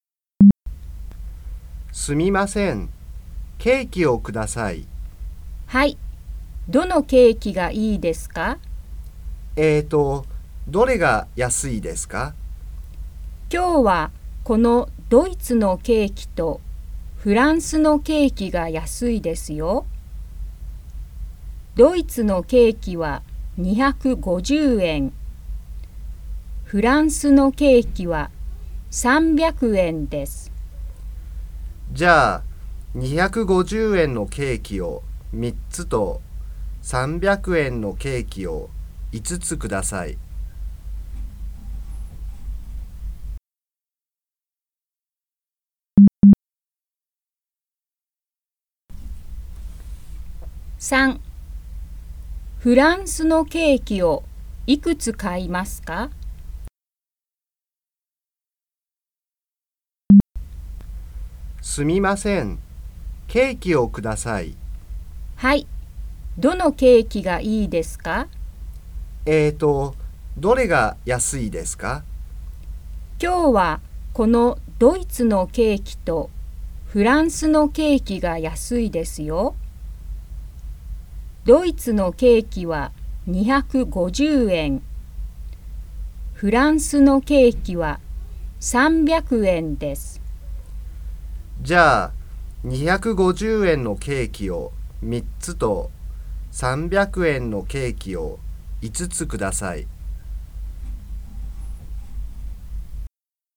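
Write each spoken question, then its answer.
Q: フランスのケーキをいくつ買いますか?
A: 5つ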